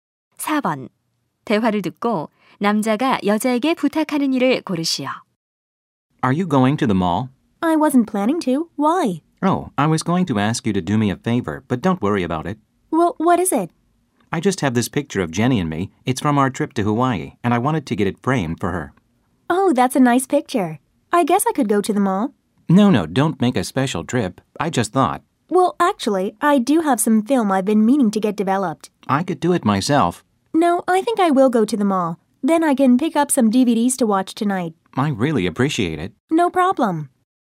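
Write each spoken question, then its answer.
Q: 대화를 듣고 남자가 여자에게 부탁하는 일을 고르시오.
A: 사진 액자 맞춰 오기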